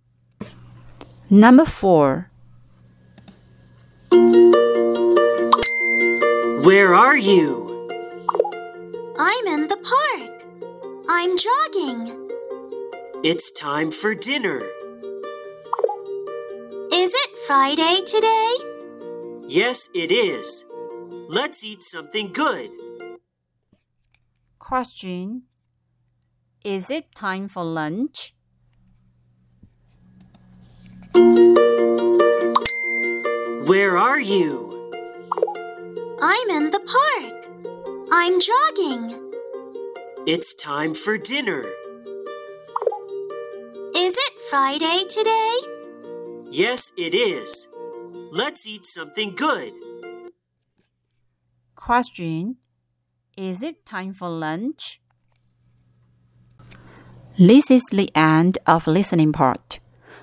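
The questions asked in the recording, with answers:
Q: Is it time for lunch?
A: No, it isn't. It's time for dinner.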